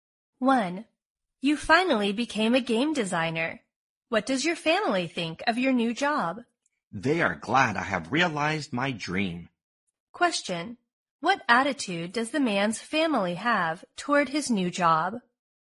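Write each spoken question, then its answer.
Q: What attitude does the man's family have toward his new job?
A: They are glad and supportive; he has realized his dream.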